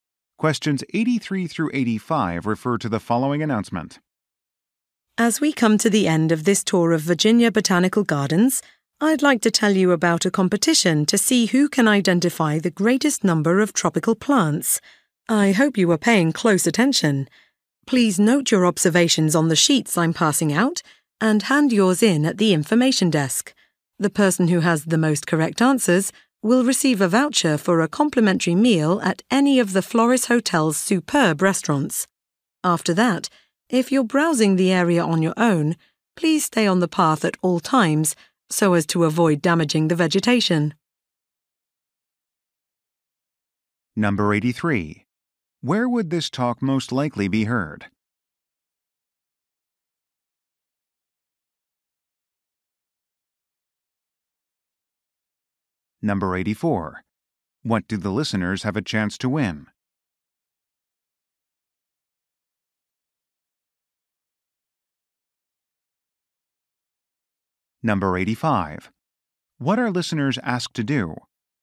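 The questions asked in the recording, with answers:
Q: Where would this talk most likely be heard?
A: At a botanical garden

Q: What do the listeners have a chance to win?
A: A voucher for a free meal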